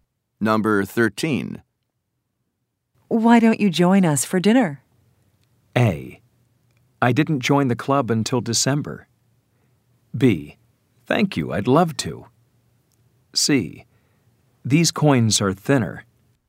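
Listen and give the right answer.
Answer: B: Thank you, I'd love to.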